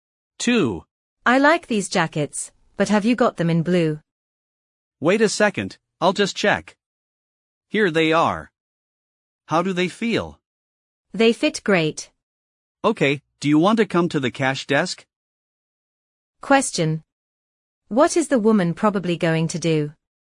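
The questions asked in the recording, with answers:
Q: What is the woman probably going to do?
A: Pay for the jacket at the cash desk.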